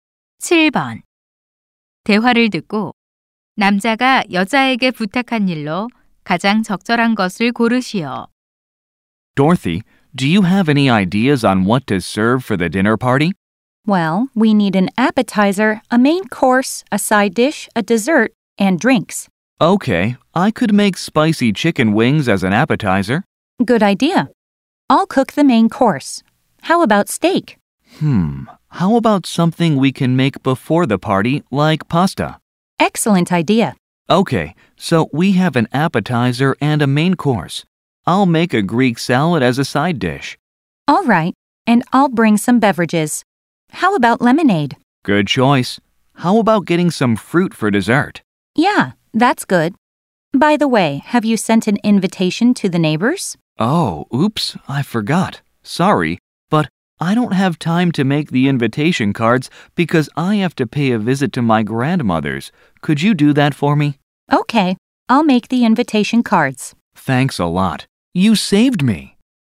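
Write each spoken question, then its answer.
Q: 대화를 듣고 남자가 여자에게 부탁한 일로 가장 적절한 것을 고르시오.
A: 초대장 만들기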